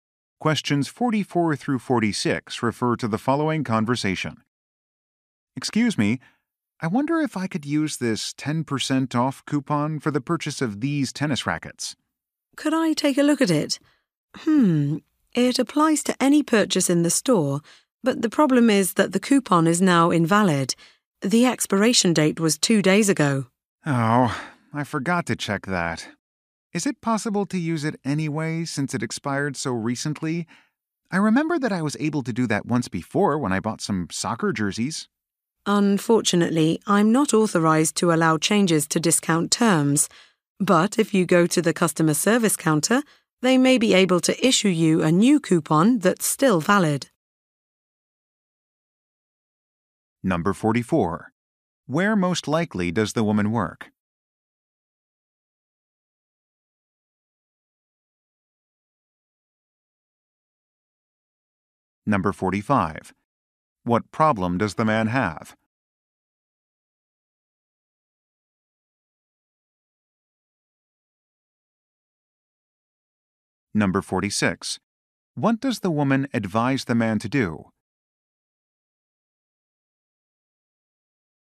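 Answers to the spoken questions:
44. At a sporting goods store
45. His coupon has expired
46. Go to the customer service counter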